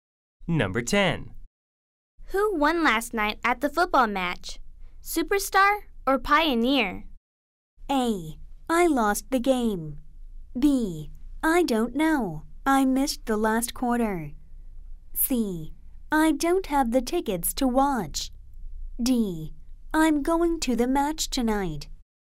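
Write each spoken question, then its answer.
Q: Who won last night at the football match?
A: B: I don't know. I missed the last quarter.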